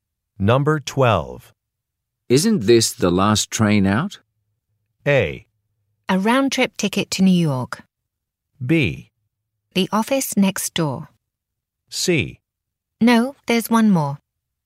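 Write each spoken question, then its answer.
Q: Isn't this the last train out?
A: C: No, there's one more.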